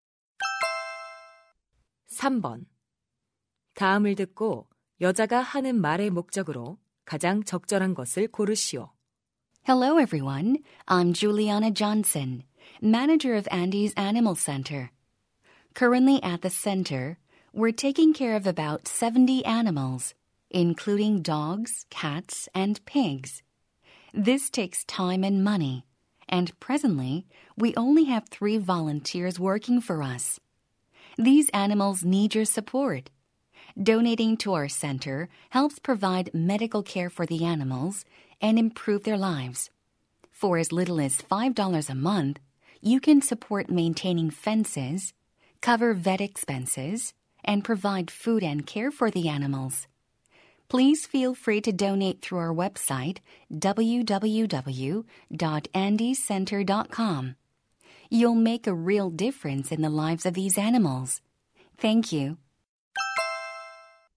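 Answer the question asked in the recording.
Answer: 동물 센터에 기부를 요청하려고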